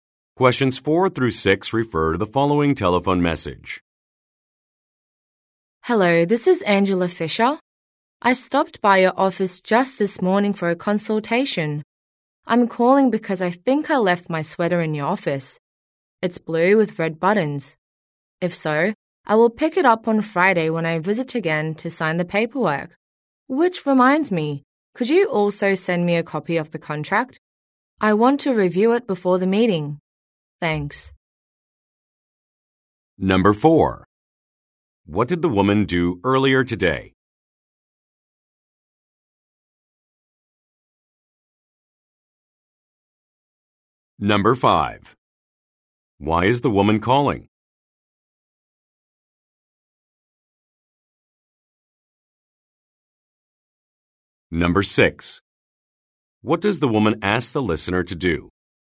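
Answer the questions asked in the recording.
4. She had a consultation at the office.
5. She thinks she left her sweater there.
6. Send her a copy of the contract.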